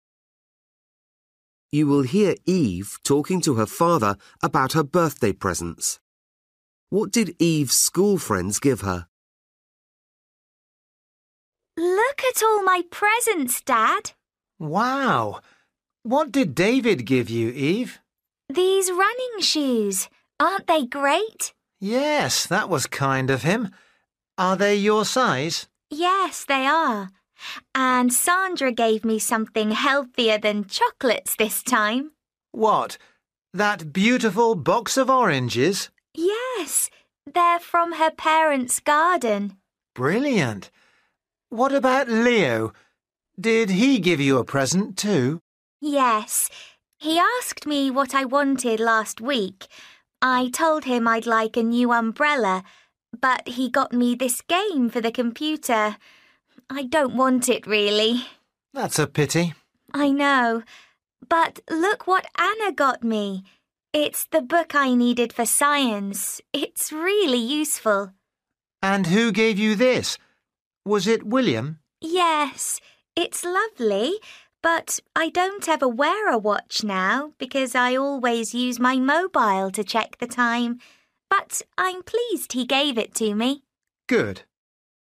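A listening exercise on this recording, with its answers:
For each question, choose the correct answer.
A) chocolates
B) computer game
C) fruit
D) mobile phone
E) textbook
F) trainers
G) umbrella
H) watch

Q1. David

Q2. Sandra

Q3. Leo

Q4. Anna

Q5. William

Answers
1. F
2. C
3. B
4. E
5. H

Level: Luyện nghe trình độ A2

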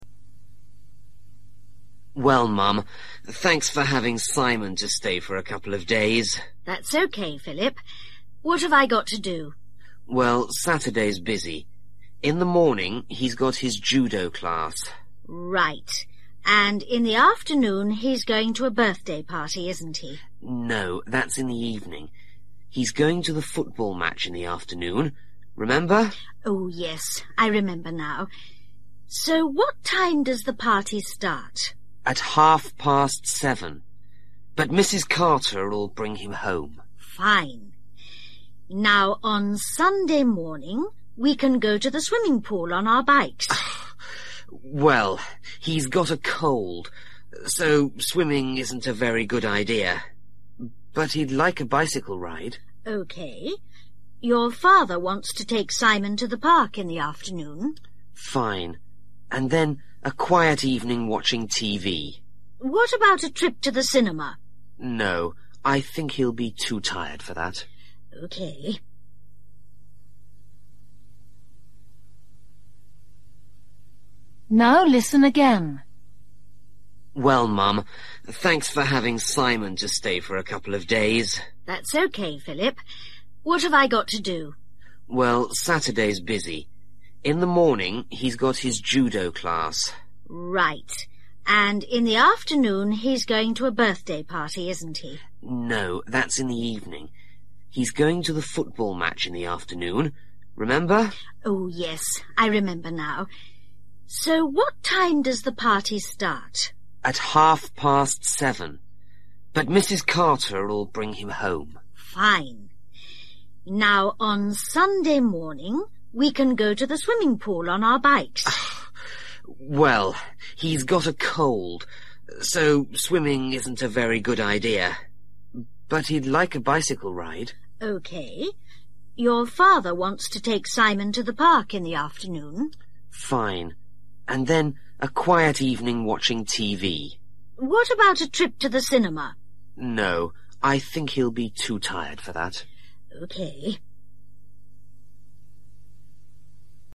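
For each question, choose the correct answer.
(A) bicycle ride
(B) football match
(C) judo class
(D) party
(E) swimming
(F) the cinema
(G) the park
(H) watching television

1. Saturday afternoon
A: B

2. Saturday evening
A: D

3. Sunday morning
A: A

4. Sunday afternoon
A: G

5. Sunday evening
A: H

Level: Luyện nghe trình độ A2

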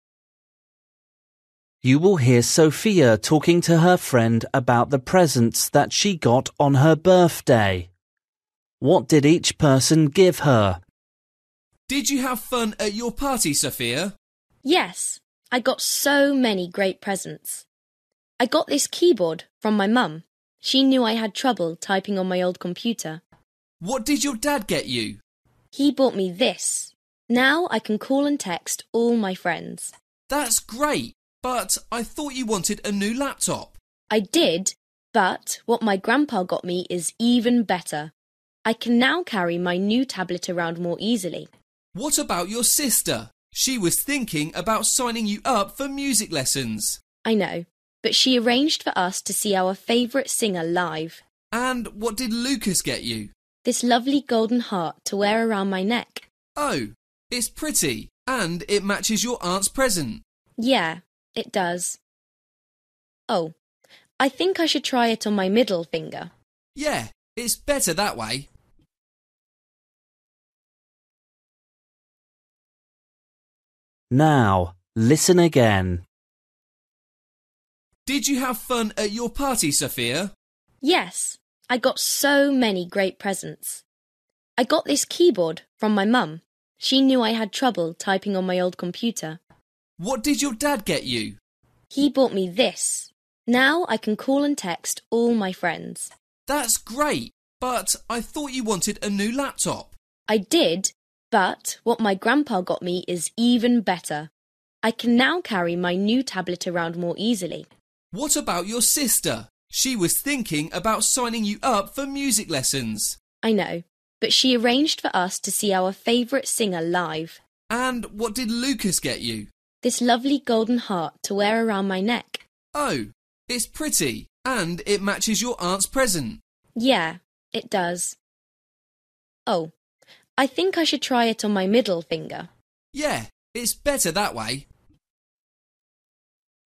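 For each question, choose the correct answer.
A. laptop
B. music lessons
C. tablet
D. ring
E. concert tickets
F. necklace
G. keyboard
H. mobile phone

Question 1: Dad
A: H

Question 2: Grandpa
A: C

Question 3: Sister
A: E

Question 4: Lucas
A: F

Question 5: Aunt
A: D

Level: Luyện nghe trình độ A2

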